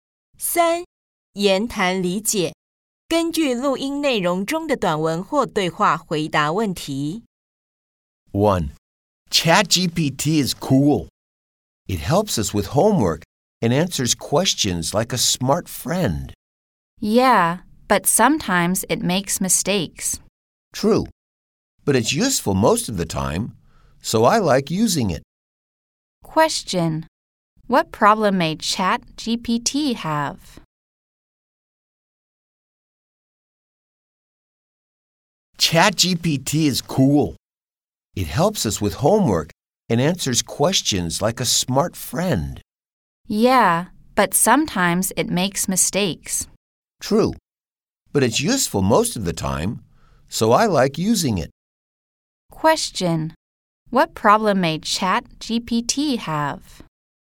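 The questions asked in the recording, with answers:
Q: What problem may ChatGPT have?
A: It sometimes makes mistakes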